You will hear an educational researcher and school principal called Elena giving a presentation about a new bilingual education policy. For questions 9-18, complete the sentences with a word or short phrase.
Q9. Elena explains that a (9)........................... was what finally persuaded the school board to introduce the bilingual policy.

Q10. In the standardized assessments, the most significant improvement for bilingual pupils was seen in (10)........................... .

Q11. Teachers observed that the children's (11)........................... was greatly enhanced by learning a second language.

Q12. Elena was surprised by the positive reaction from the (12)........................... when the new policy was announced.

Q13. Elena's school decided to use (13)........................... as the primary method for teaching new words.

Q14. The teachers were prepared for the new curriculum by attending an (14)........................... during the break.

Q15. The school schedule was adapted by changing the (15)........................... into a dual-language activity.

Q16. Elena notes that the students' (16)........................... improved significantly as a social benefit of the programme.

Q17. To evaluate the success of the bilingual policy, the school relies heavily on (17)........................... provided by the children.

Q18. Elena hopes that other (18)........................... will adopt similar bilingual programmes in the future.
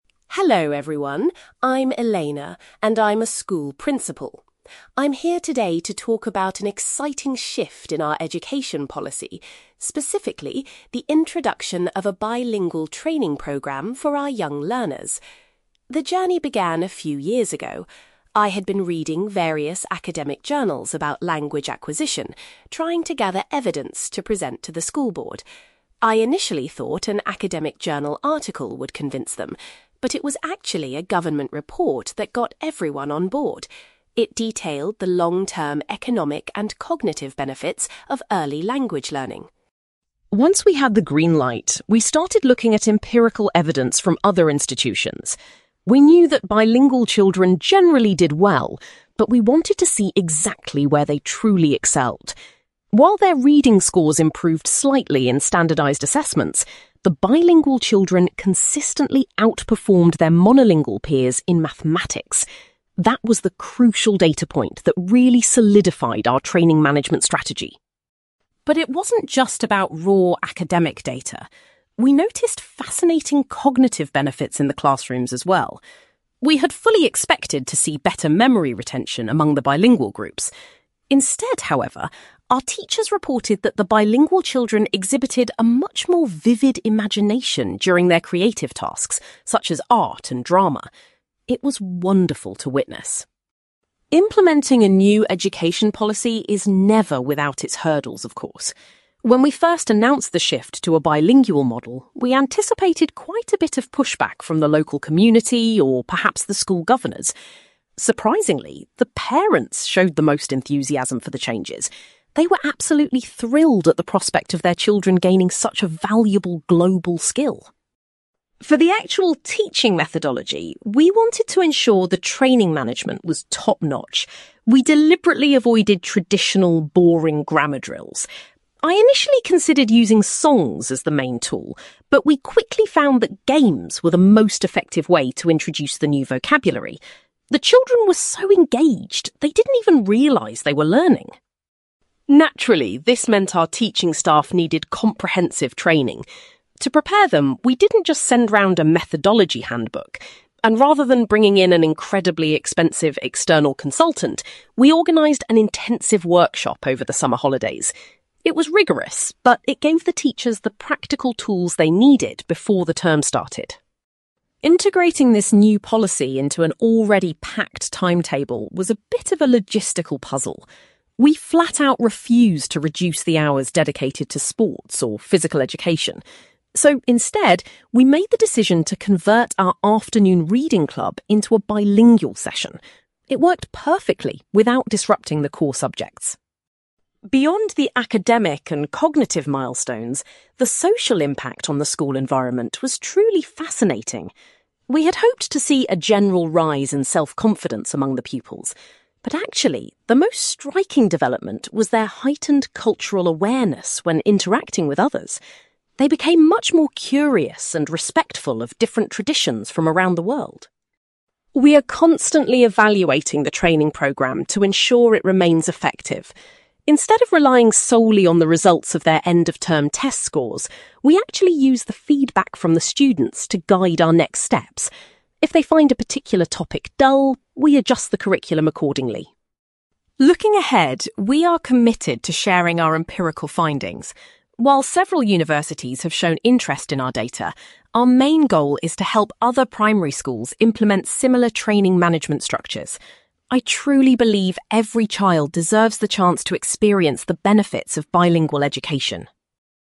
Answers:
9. government report
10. mathematics
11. imagination
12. parents
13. games
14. intensive workshop
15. reading club
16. cultural awareness
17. feedback
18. primary schools

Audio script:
Elena: Hello everyone. I'm Elena, and I'm a school principal. I'm here today to talk about an exciting shift in our education policy—specifically, the introduction of a bilingual training programme for our young learners. The journey began a few years ago. I had been reading various academic journals about language acquisition, trying to gather evidence to present to the school board. I initially thought an academic journal article would convince them, but it was actually a government report that got everyone on board. It detailed the long-term economic and cognitive benefits of early language learning.
Once we had the green light, we started looking at empirical evidence from other institutions. We knew that bilingual children generally did well, but we wanted to see exactly where they truly excelled. While their reading scores improved slightly in standardized assessments, the bilingual children consistently outperformed their monolingual peers in mathematics. That was the crucial data point that really solidified our training management strategy.
But it wasn't just about raw academic data. We noticed fascinating cognitive benefits in the classrooms as well. We had fully expected to see better memory retention among the bilingual groups. Instead, however, our teachers reported that the bilingual children exhibited a much more vivid imagination during their creative tasks, such as art and drama. It was wonderful to witness.
Implementing a new education policy is never without its hurdles, of course. When we first announced the shift to a bilingual model, we anticipated quite a bit of pushback from the local community or perhaps the school governors. Surprisingly, the parents showed the most enthusiasm for the changes. They were absolutely thrilled at the prospect of their children gaining such a valuable global skill.
For the actual teaching methodology, we wanted to ensure the training management was top-notch. We deliberately avoided traditional, boring grammar drills. I initially considered using songs as the main tool, but we quickly found that games were the most effective way to introduce the new vocabulary. The children were so engaged they didn't even realise they were learning.
Naturally, this meant our teaching staff needed comprehensive training. To prepare them, we didn't just send round a methodology handbook. And rather than bringing in an incredibly expensive external consultant, we organised an intensive workshop over the summer holidays. It was rigorous, but it gave the teachers the practical tools they needed before the term started.
Integrating this new policy into an already packed timetable was a bit of a logistical puzzle. We flat-out refused to reduce the hours dedicated to sports or physical education. So, instead, we made the decision to convert our afternoon reading club into a bilingual session. It worked perfectly without disrupting the core subjects.
Beyond the academic and cognitive milestones, the social impact on the school environment was truly fascinating. We had hoped to see a general rise in self-confidence among the pupils. But actually, the most striking development was their heightened cultural awareness when interacting with others. They became much more curious and respectful of different traditions from around the world.
We are constantly evaluating the training programme to ensure it remains effective. Instead of relying solely on the results of their end-of-term test scores, we actually use the feedback from the students to guide our next steps. If they find a particular topic dull, we adjust the curriculum accordingly.
Looking ahead, we are committed to sharing our empirical findings. While several universities have shown interest in our data, our main goal is to help other primary schools implement similar training management structures. I truly believe every child deserves the chance to experience the benefits of bilingual education.

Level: B2